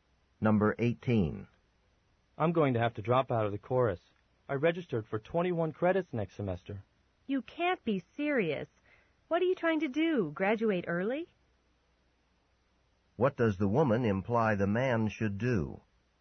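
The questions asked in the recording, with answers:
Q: What does the woman imply the man should do?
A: Take fewer credits.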